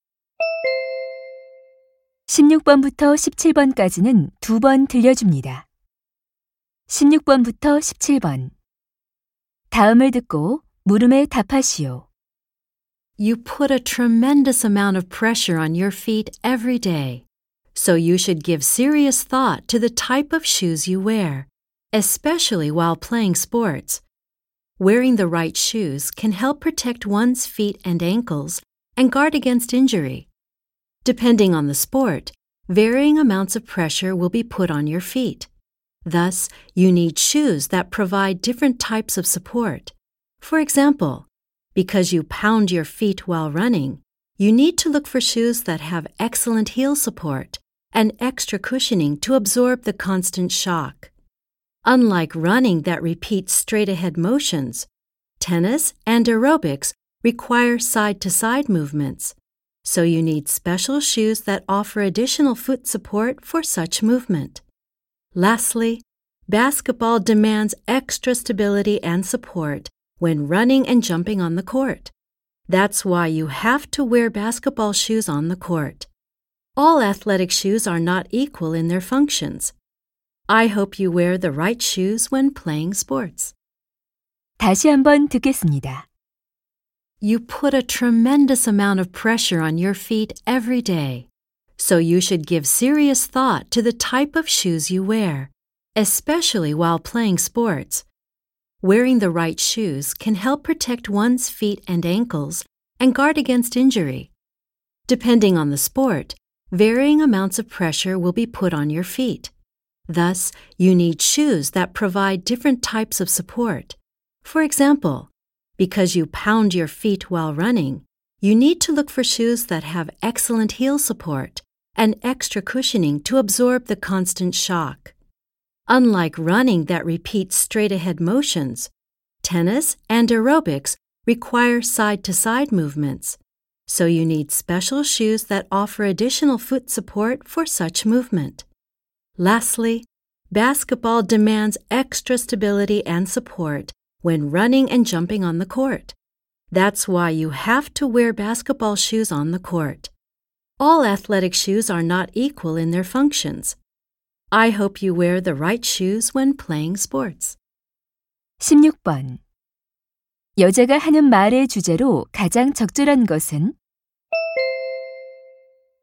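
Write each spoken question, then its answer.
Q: 여자가 하는 말의 주제로 가장 적절한 것은?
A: 운동 종목에 맞는 운동화를 신는 것의 중요성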